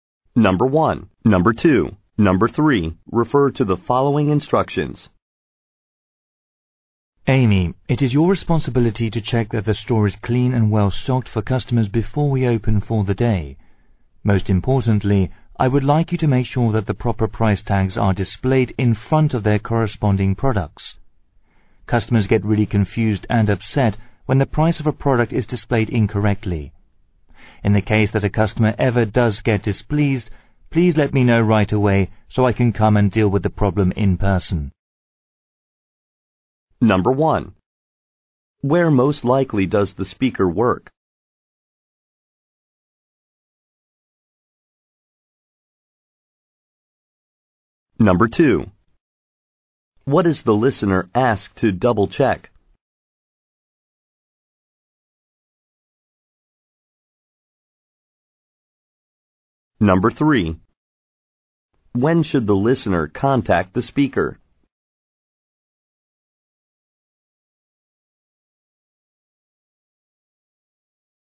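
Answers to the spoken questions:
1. At a store
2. That the correct price tags are displayed in front of the products
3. When a customer gets displeased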